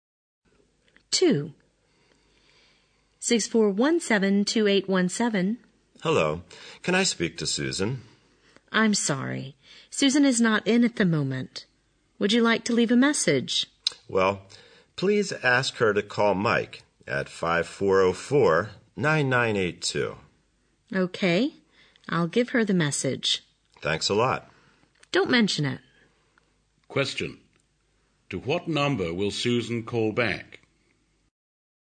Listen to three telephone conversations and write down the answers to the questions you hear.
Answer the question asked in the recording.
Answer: 5404-9982